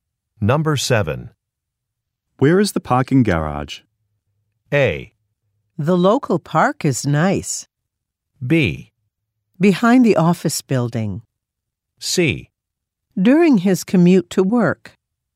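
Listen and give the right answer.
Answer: B: Behind the office building.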